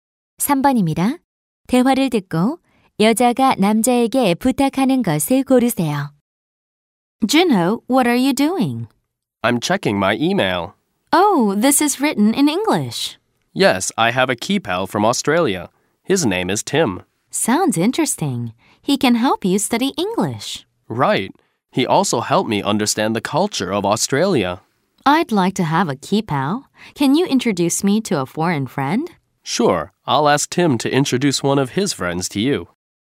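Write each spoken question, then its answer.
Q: 대화를 듣고 여자가 남자에게 부탁하는 것을 고르세요.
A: 외국인 친구 소개해 주기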